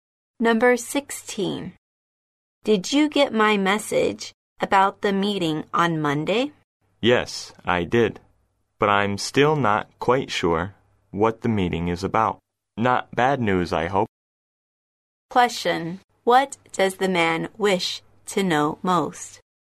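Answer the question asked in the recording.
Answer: What the meeting is about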